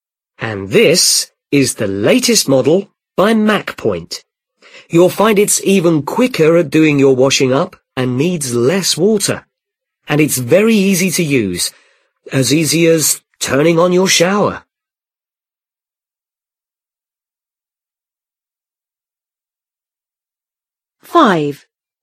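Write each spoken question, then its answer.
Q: What is the man selling?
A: a dishwasher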